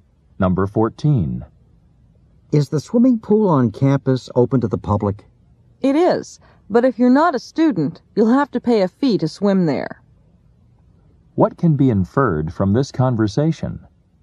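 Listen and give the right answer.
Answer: Non-students must pay a fee to use the pool.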